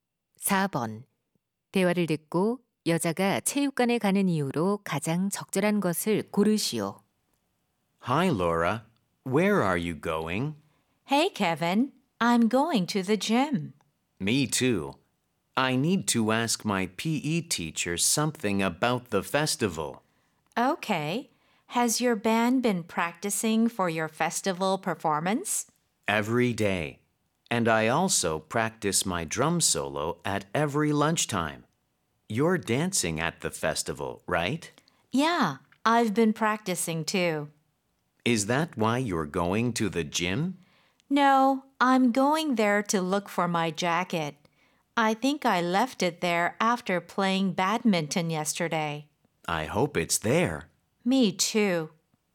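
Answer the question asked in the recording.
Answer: 재킷을 찾으려고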